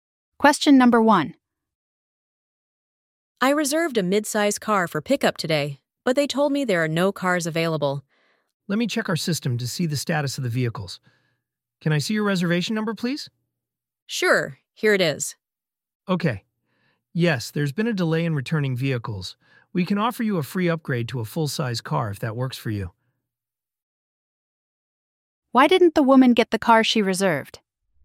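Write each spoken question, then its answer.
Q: Why didn't the woman get the car she reserved?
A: There was a delay in returning vehicles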